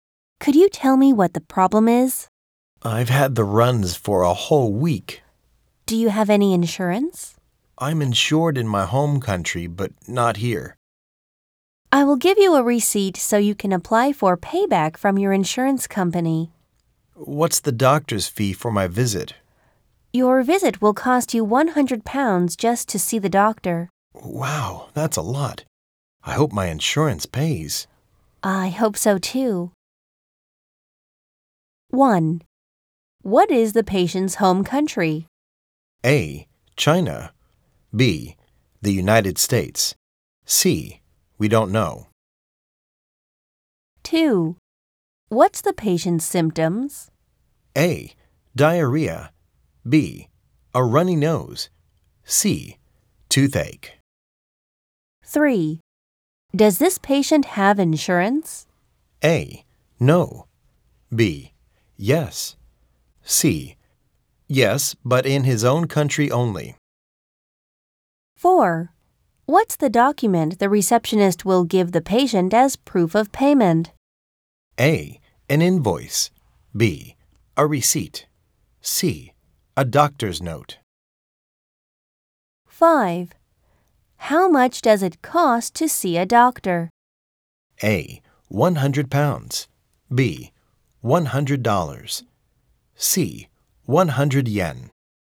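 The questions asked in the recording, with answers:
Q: What is the patient's home country?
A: C: We don't know.

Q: What's the patient's symptoms?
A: A: Diarrhea.

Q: Does this patient have insurance?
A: C: Yes, but in his own country only.

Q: What's the document the receptionist will give the patient as proof of payment?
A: B: A receipt.

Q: How much does it cost to see a doctor?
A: A: £100.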